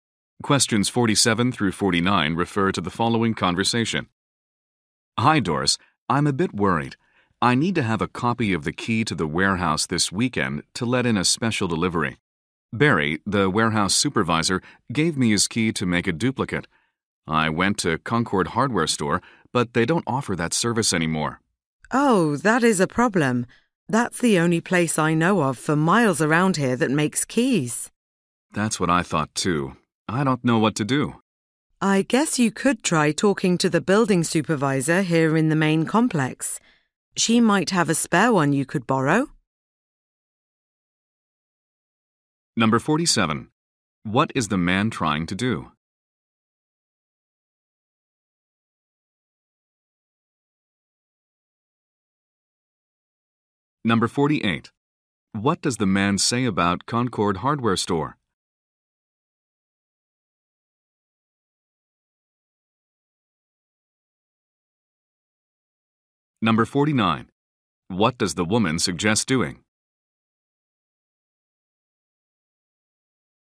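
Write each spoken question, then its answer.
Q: What is the man trying to do?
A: Get a copy of a warehouse key made.

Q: What does the man say about Concord Hardware Store?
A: It no longer makes copies of keys.

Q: What does the woman suggest doing?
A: Asking the building supervisor for a spare key.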